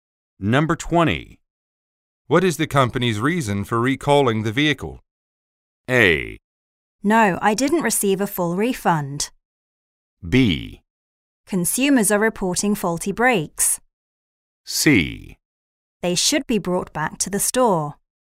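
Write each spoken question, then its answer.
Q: What is the company's reason for recalling the vehicle?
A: B: Consumers are reporting faulty brakes.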